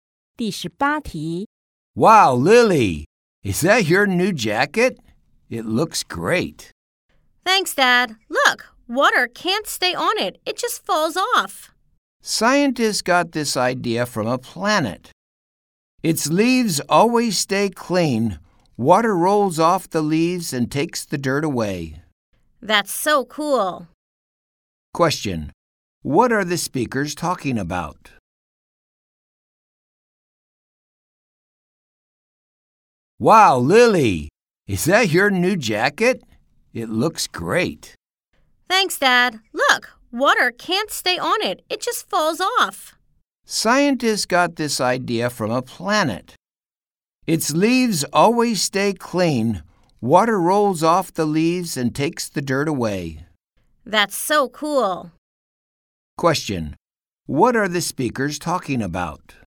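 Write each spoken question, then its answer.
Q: Question. What are the speakers talking about?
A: A new jacket that water can't stay on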